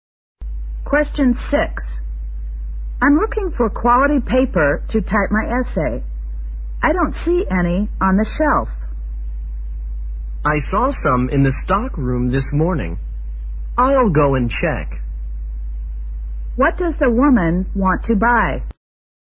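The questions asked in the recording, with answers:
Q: What does the woman want to buy?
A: Quality paper to type her essay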